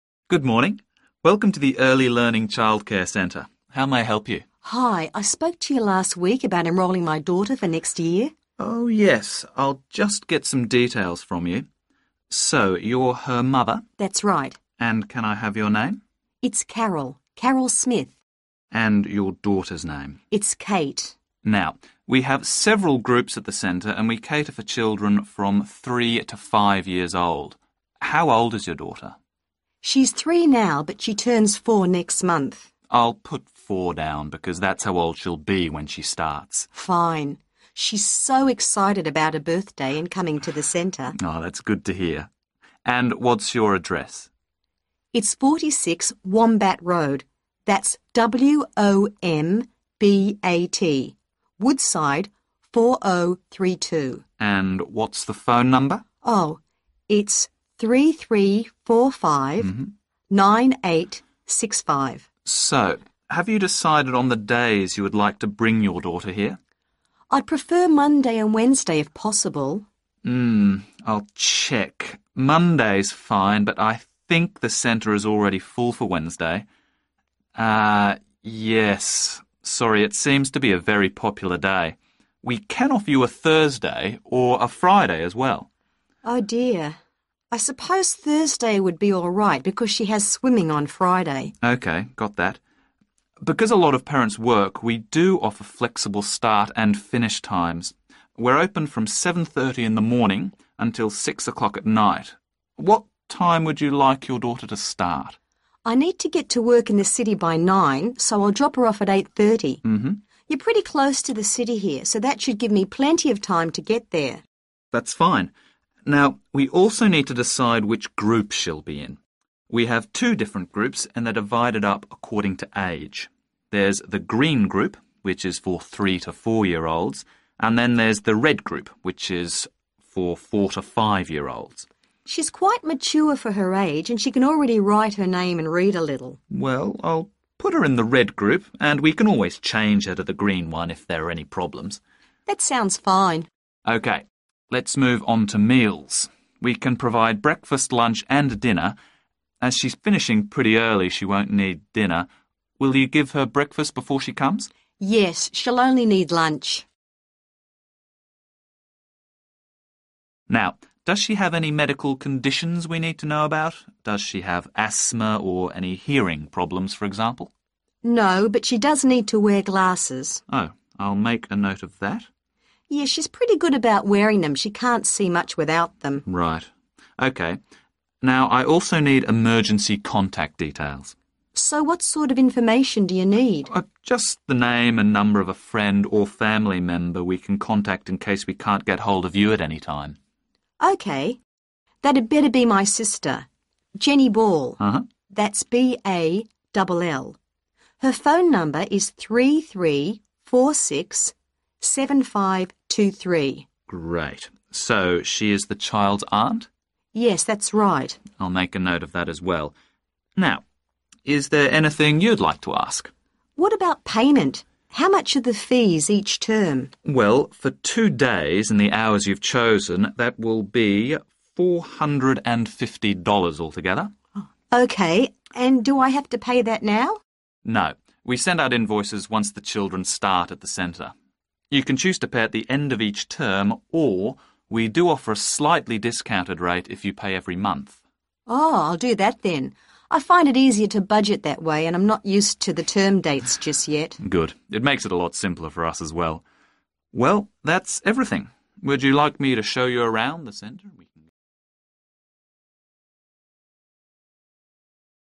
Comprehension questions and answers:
Complete the form below. Write ONE WORD AND/OR A NUMBER for each answer.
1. Age: 1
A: 4

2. Address: 2 Road, Woodside, 4032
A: 46 Wombat

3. Days enrolled for: Monday and 3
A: Thursday

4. Start time: 4 am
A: 8.30

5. Childcare group: the 5 group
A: red

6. Which meal/s are required each day? 6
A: lunch

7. Medical conditions: needs 7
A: glasses

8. Emergency contact: Jenny 8 Phone: 3346 7523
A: Ball

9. Relationship to child: 9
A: aunt

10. Will pay each 10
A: month

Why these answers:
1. Từ cần điền là số tuổi Nội dung bài: Lễ tân hỏi con gái bao nhiêu tuổi, cô ấy trả lời con gái cô ấy 3 tuổi nhưng sang tháng lên 4 tuổi → Lễ tân bảo họ sẽ ghi là 4 để đúng với thời gian họ tiếp nhận phục vụ
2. Bài đã có sẵn từ Road, Woodside, 4032 → Chỉ cần điền số nhà và tên đường vào chỗ trống. Nội dung bài: Người mẹ đọc địa chỉ: 46 Wombat Road, Woodside 4032. Nhưng trong form, từ "Road, Woodside, 4032" đã được in sẵn → chỉ còn thiếu phần 46 Wombat và tên đường cũng được đánh vần W-O-M-B-A-T
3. Từ cần điền là một danh từ chỉ các thứ trong tuần Nội dung bài: Ban đầu, người mẹ muốn Monday và Wednesday. Tuy nhiên, Wednesday đã kín chỗ → không thể chọn được. Trung tâm đưa ra lựa chọn thay thế: Thursday hoặc Friday. Người mẹ quyết định: Thursday (vì bé có lớp bơi vào thứ Sáu)
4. Từ cần điền là một số về thời gian. Nội dung bài: Trung tâm hỏi giờ bắt đầu gửi bé. Người mẹ giải thích: vì phải có mặt ở thành phố lúc 9:00 nên sẽ đưa con đến lúc 8:30.
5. Từ cần điền là một danh từ chỉ tên của nhóm Nội dung bài: Trung tâm có 2 nhóm: Green group → cho trẻ từ 3–4 tuổi Red group → cho trẻ từ 4–5 tuổi Bé Kate sắp 4 tuổi → đủ tuổi để xếp vào nhóm "red". Người tiếp nhận quyết định: "I'll put her in the red group."
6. Từ cần điền là một danh từ chỉ tên đường. Nội dung bài: Trung tâm đưa ra 3 bữa: breakfast, lunch, dinner. Vì bé được đưa đến từ 8.30 sáng và về sớm nên: Không cần dinner. Buổi sáng mẹ cho ăn sáng ở nhà rồi → không cần breakfast. Người mẹ khẳng định: "she'll only need lunch" → chỉ cần lunch.
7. Từ cần điền là một danh từ chỉ thứ cần liên quan đến y tế. Nội dung bài: Câu hỏi đưa ra gợi ý: có asthma (hen suyễn) hay hearing problems (vấn đề về thính giác) không? Người mẹ phủ định: "No" → bé không có bệnh lý. Nhưng mẹ bổ sung: bé cần đeo kính → đây là thông tin đặc biệt cần ghi chú.
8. Từ cần điền là một danh từ chỉ tên người. Nội dung bài: Theo như spelling That'd better be my sister... Jenny Ball . That's B-A-double L.
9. Từ cần điền là một danh từ chỉ tên đường. Nội dung bài: Emergency contact là Jenny Ball → người mẹ nói đây là chị gái mình. Receptionist xác nhận: "So she is the child's aunt?" → Caller đồng ý.
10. Từ cần điền là một danh từ thời gian ví dụ tháng, tuần, năm... Nội dung bài: Trung tâm đưa ra 2 lựa chọn: Trả mỗi kỳ (term). Hoặc trả mỗi tháng (month), sẽ được giảm giá một chút. Người mẹ chọn: "Oh. I'll do that then ..." → tức là chọn trả monthly

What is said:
Welcome to the Early Learning Childcare Centre. How may I help you?
Caller: Hi. I spoke to you last week about enrolling my daughter for next year.
R: Oh, yes. I'll just get some details from you. So, you're her mother?
C: That's right.
R: And, can I have your name?
C: It's Carol, Carol Smith.
R: And your daughter's name?
C: It's Kate.
R: Now, we have several groups at the centre and we cater for children from three to five years old. How old is your daughter?
C: She's three now but she turns four next month.
R: I'll put four down because that's how old she'll be when she starts. [1]
C: Fine, she's so excited about her birthday and coming to the centre.
R: That's good to hear. And what's your address?
C: It's 46 Wombat Road, that's W-O-M-B-A-T [2], Woodside 4032.
R: And what's the phone number?
R: So, have you decided on the days you'd like to bring your daughter here?
C: I'd prefer Monday and Wednesday if possible.
R: Hmm. I'll check, Monday's fine, but I think the centre is already full for Wednesday. Yes. Sorry. It seems to be a very popular day. We can offer you a Thursday or a Friday as well.
C: Oh dear. I suppose Thursday would be all right [3] because she has swimming on Friday.
R: OK, got that. Because a lot of parents work, we do offer flexible start and finish times. We are open from 7:30 in the morning until 6 o'clock at night.
What time would you like your daughter to start?
C: I need to get to work in the city by 9:00 so I'll drop her off at 8:30 [4]. You're pretty close to the city here so that should give me plenty of time to get there.
R: That's fine. Now, we also need to decide which group she'll be in. We have two different groups and they're divided up according to age. There's the green group, which is for three to four-year-olds. And then there's the red group which is for four- to five-year-olds.
C: She's quite mature for her age and she can already write her name and read a little.
R: Well, I'll put her in the red group [5] and we can always change her to the green one if there are any problems.
C: That sounds fine.
R: OK. Let's move on to meals. We can provide breakfast, lunch and dinner. As she's finishing pretty early, she won't need dinner, will you give her breakfast before she comes?
C: Yes, she'll only need lunch. [6]
R: Now, does she have any medical conditions we need to know about? Does she have asthma or any hearing problems for example?
C: No. But she does need to wear glasses. [7]
R: Oh, I'll make a note of that.
C: Yes, she's pretty good about wearing them, she can't see much without them.
R: Right. OK. Now, I also need emergency contact details.
C: So what sort of information do you need?
R: Just the name and number of a friend or family member we can contact in case we can't get hold of you at any time.
C: That'd better be my sister... Jenny Ball . That's B-A-double L [8]. Her phone number is 3346 7523.
R: Great. So she is the child's aunt?
C: Yes, that's right. [9]
R: I'll make a note of that as well. Now, is there anything you'd like to ask?
C: What about payment? How much are the fees each term?
R: Well, for two days and the hours you've chosen, that will be $450 altogether.
C: OK, and do I have lo pay that now?
R: No, we send out invoices once the children start at the centre. You can choose to pay at the end of each term or we do offer a slightly discounted rate if you pay every month.
C: Oh. I'll do that then . I find it easier to budget that way and I'm not used to the term dates just yet.
R: Good, it makes it a lot simpler for us as well. Well, that's everything.